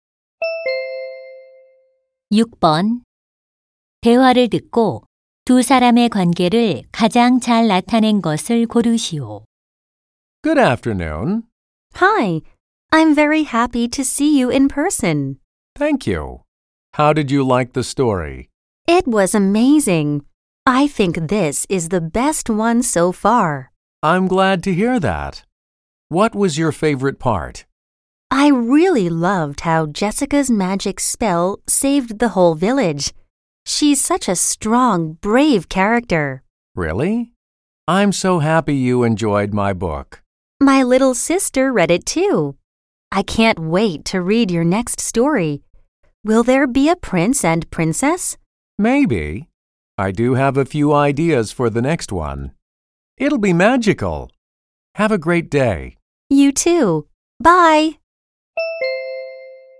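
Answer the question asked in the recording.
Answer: 작가 - 독자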